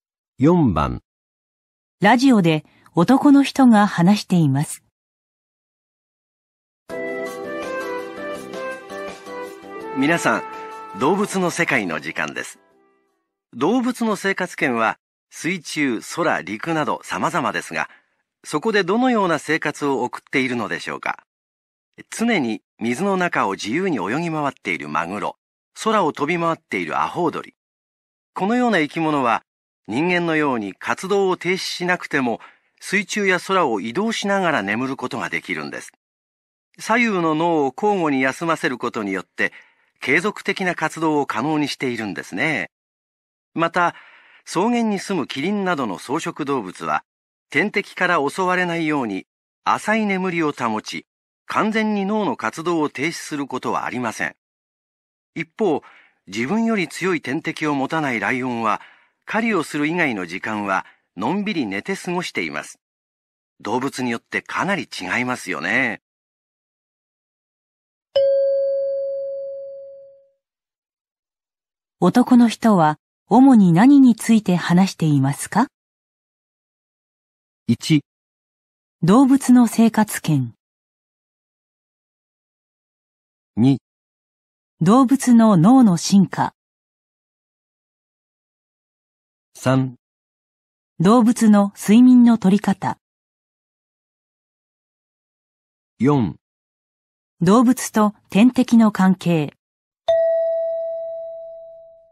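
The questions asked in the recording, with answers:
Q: 男の人は主に何について話していますか?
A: 3: 動物の睡眠の取り方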